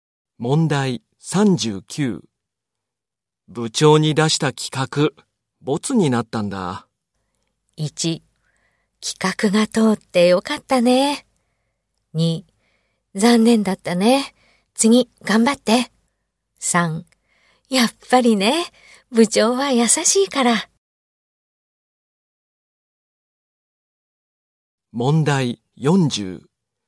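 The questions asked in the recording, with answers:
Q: 部長に出した企画、ボツになったんだ。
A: 2: 残念だったね。次、頑張って。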